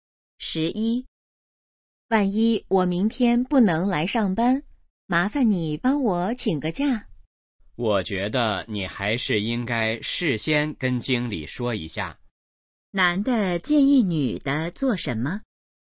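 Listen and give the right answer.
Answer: 事先跟经理说一下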